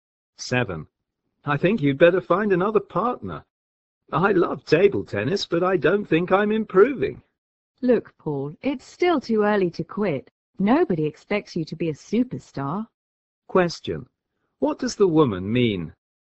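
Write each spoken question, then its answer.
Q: What does the woman mean?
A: Paul shouldn't give up table tennis yet; it's too early to quit.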